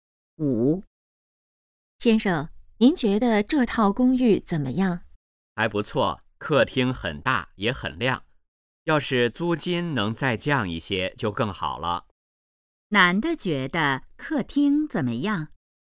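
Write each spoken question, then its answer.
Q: 男的觉得客厅怎么样?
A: 很大,也很亮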